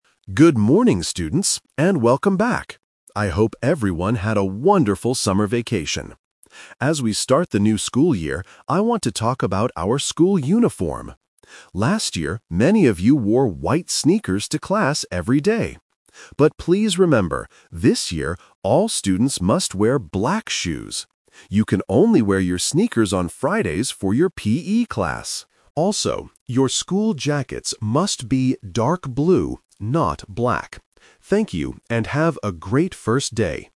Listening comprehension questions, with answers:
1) What is the main topic of the announcement?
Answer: The school uniform

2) What kind of shoes must students wear to class this year?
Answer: Black shoes

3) When are students allowed to wear sneakers?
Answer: On Fridays

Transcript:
Principal: Good morning, students, and welcome back! I hope everyone had a wonderful summer vacation. As we start the new school year, I want to talk about our school uniform. Last year, many of you wore white sneakers to class every day. But please remember, this year, all students must wear black shoes. You can only wear your sneakers on Fridays for your PE class. Also, your school jackets must be dark blue, not black. Thank you, and have a great first day!